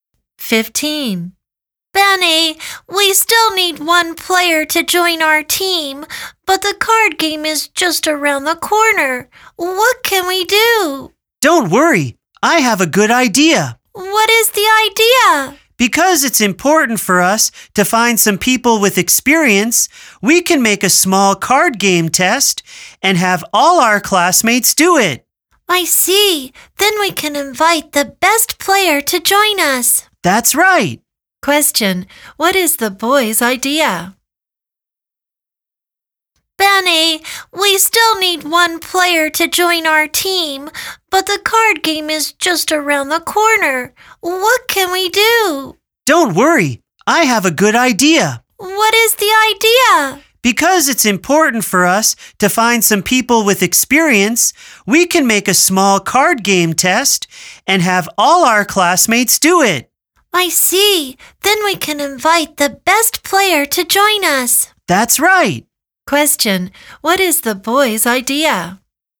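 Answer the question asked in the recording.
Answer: Give all their classmates a small card game test and invite the best player to join the team.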